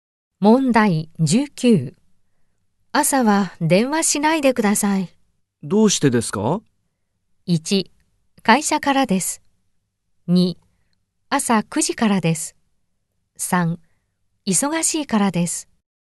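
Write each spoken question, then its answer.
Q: 朝は電話しないでください。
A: 3: 忙しいからです。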